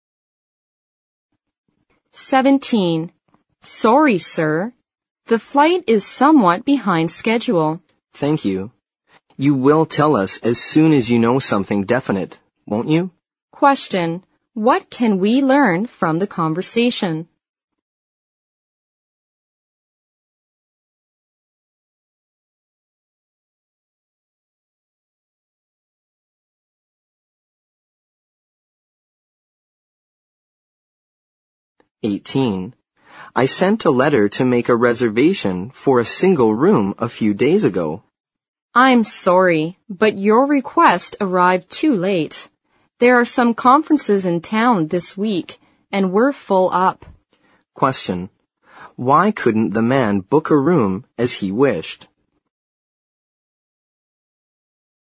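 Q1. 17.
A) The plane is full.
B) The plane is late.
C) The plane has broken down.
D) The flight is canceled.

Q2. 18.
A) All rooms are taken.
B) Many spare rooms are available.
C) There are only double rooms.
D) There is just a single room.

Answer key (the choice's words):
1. The plane is late.
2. All rooms are taken.

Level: 四级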